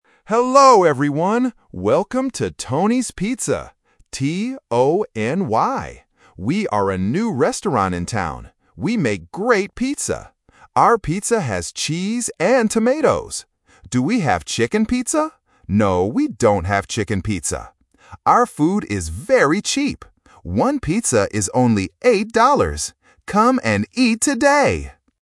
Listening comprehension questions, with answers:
Listen to a radio advertisement for a new restaurant and choose the correct answer (A, B, or C) for each question.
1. How does the announcer spell the name of the restaurant?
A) T-O-M-Y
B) T-O-N-Y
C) T-O-N-I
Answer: T-O-N-Y

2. What pizza do they NOT have?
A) Cheese pizza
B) Tomato pizza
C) Chicken pizza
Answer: Chicken pizza

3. How much is one pizza?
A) $8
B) $18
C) $80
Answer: $8

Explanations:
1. The announcer says the name of the restaurant is Tony's Pizza and spells it clearly: "T-O-N-Y". Options (A) and (C) are distractors with similar spelling and sound.
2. The announcer explicitly asks, "Do we have chicken pizza?" and answers, "No, we don't have chicken pizza." Options (A) and (B) are The Trap: cheese and tomatoes are mentioned as ingredients they do put on their pizza.
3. The announcer states, "One pizza is only eight dollars." Option (B) $18 is a common distractor (eight vs eighteen) for A1 learners. Option (C) $80 is also a distractor with a similar starting sound.

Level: A1

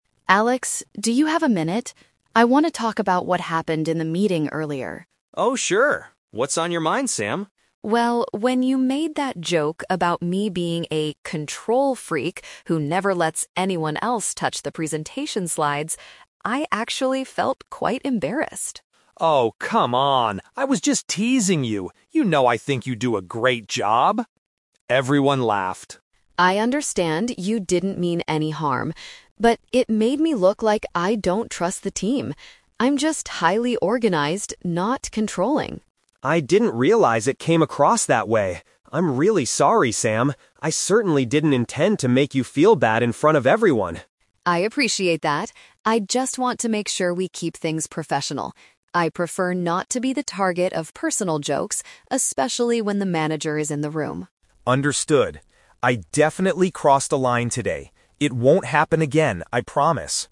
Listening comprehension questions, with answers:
Listen to a conversation between two office workers, Sam and Alex. For each question, choose the correct answer A, B, or (C).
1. What is the MAIN reason Sam is upset about Alex's joke?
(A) It made her seem suspicious of her own coworkers.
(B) It proved that she is a very disorganized person.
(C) It caused the manager to give her more work.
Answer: It made her seem suspicious of her own coworkers.

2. How did Alex INITIALLY defend his behavior?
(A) He immediately admitted that he had crossed a line.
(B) He claimed that he was only trying to be funny.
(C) He said that the other team members told him to do it.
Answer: He claimed that he was only trying to be funny.

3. What boundary does Sam want to set for the future?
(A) She wants to design all the presentation slides by herself.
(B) She wants Alex to maintain a respectful and professional attitude.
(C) She wants Alex to stop speaking completely during meetings.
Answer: She wants Alex to maintain a respectful and professional attitude.

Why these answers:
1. Sam says the joke "made me look like I don't trust the team." Not trusting the team is paraphrased as being "suspicious of her own coworkers."
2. At first, Alex defends himself by saying, "I was just teasing you" and mentions that "Everyone laughed." To "tease" someone in this context means trying to be funny at their expense.
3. Sam tells Alex, "I just want to make sure we keep things professional" and asks not to be the target of personal jokes.

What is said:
Sam: Alex, do you have a minute? I want to talk about what happened in the meeting earlier.
Alex: Oh, sure. What's on your mind, Sam?
Sam: Well, when you made that joke about me being a "control freak" who never lets anyone else touch the presentation slides... I actually felt quite embarrassed.
Alex: Oh, come on! I was just teasing you. You know I think you do a great job. Everyone laughed.
Sam: I understand you didn't mean any harm. But it made me look like I don't trust the team. I'm just highly organized, not controlling.
Alex: I didn't realize it came across that way. I'm really sorry, Sam. I certainly didn't intend to make you feel bad in front of everyone.
Sam: I appreciate that. I just want to make sure we keep things professional. I prefer not to be the target of personal jokes, especially when the manager is in the room.
Alex: Understood. I definitely crossed a line today. It won't happen again, I promise.

